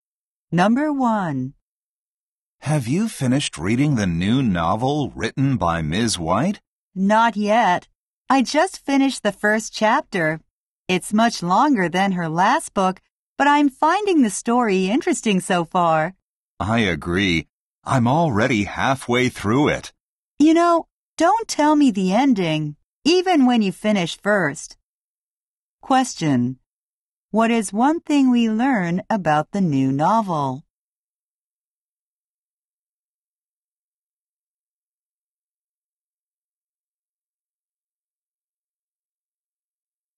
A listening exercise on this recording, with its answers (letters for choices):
会話を聞き、その質問に対して最も適切なものを選びなさい。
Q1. What is one thing we learn about the new novel?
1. The story is too simple.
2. It is quite long.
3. The ending is boring.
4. There are too many characters.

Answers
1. 2

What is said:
★:Have you finished reading the new novel written by Ms. White?
☆:Not yet. I just finished the first chapter. It's much longer than her last book, but I'm finding the story interesting so far.
★:I agree. I'm already halfway through it.
☆:You know, don't tell me the ending, even when you finish first.
Question: What is one thing we learn about the new novel?

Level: 英検準2級プラス